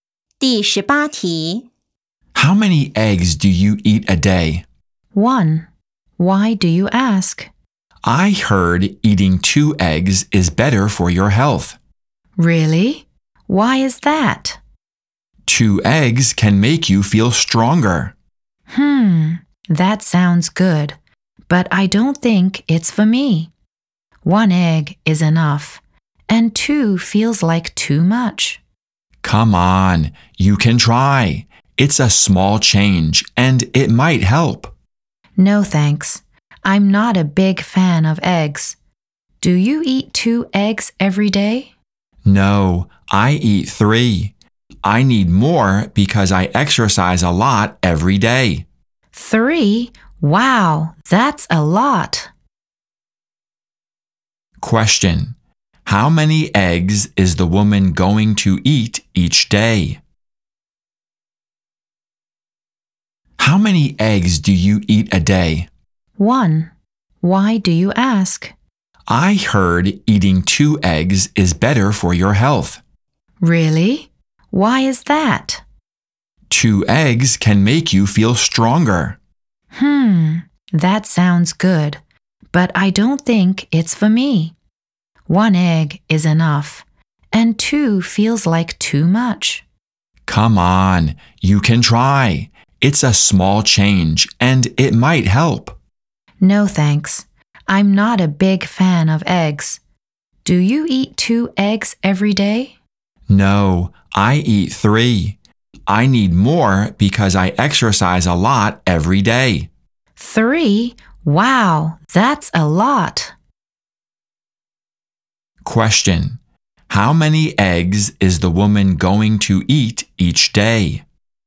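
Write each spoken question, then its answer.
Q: How many eggs is the woman going to eat each day?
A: One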